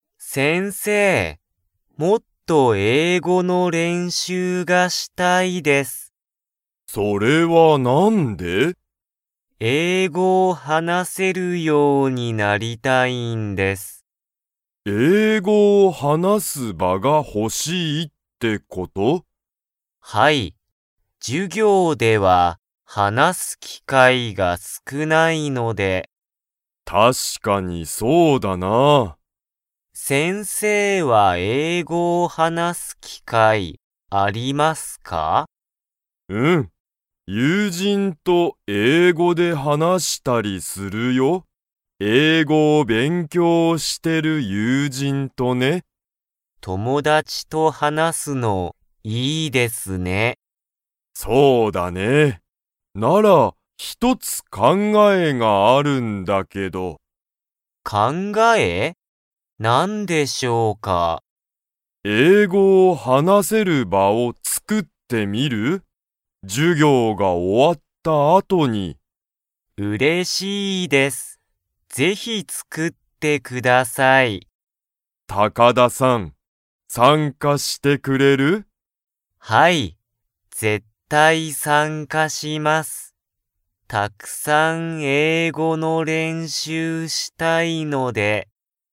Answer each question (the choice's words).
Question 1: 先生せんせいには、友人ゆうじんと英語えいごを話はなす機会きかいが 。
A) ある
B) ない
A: ある

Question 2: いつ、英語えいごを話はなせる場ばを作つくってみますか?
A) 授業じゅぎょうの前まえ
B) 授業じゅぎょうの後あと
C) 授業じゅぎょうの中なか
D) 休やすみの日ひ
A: 授業じゅぎょうの後あと

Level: Level 3